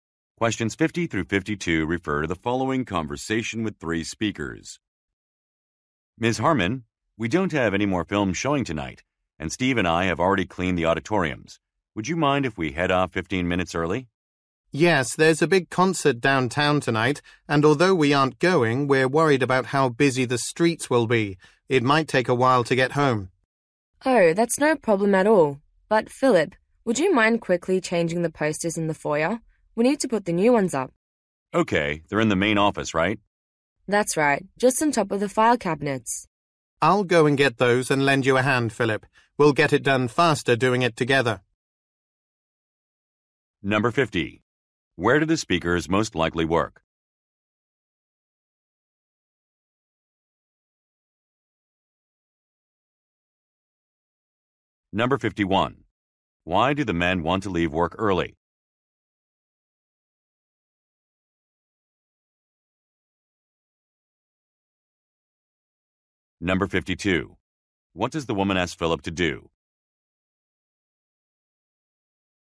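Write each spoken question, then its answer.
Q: Where do the speakers most likely work?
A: At a movie theater

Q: Why do the men want to leave work early?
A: Streets will be busy because of a concert

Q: What does the woman ask Philip to do?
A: Change the posters in the foyer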